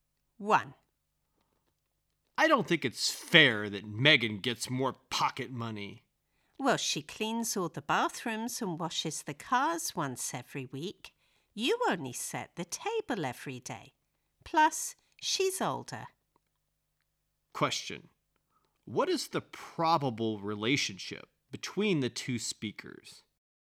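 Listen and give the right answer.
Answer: Parent and child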